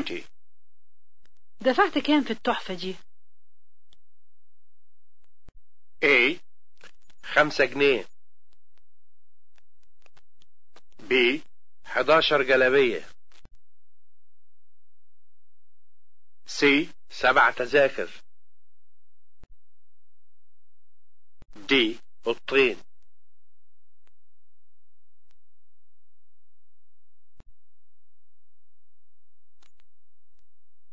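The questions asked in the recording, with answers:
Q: دفعت كام في التحفة دي؟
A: A: خمسة جنيه.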